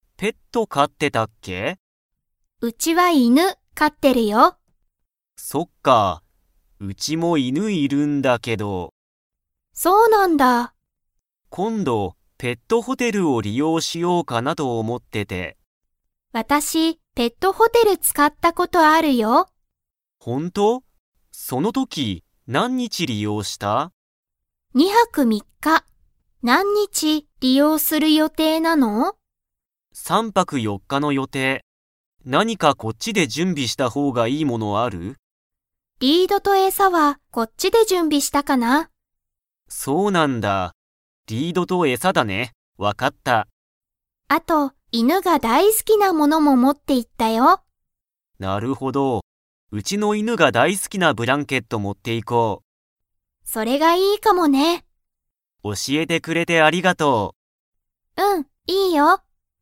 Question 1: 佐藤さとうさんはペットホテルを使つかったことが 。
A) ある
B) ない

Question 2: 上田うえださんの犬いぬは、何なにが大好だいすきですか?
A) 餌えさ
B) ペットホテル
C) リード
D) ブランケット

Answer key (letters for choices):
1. A
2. D

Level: Level 4